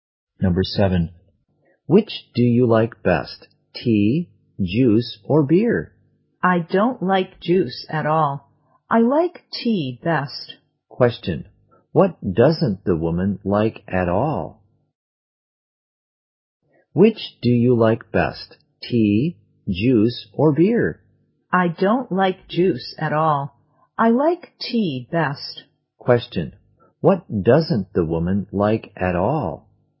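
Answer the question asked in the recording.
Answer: Juice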